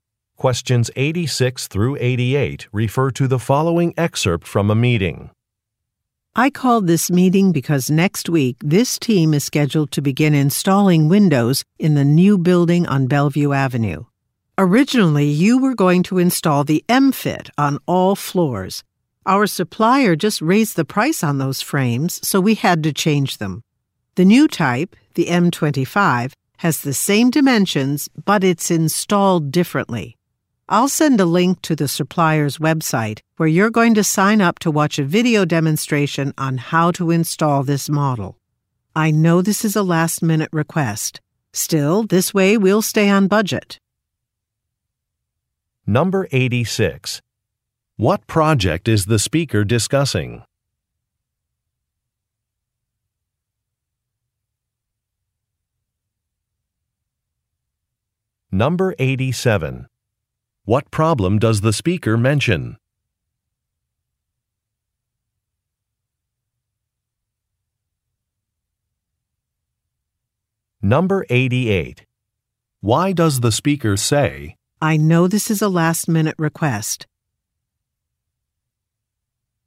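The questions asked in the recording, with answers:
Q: What project is the speaker discussing?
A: Installing windows in a new building

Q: What problem does the speaker mention?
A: The supplier raised the price of the frames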